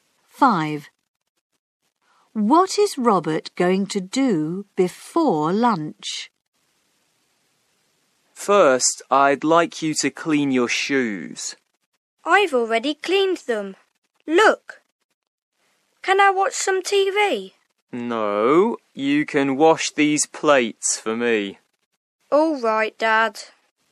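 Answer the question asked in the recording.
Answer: Wash the plates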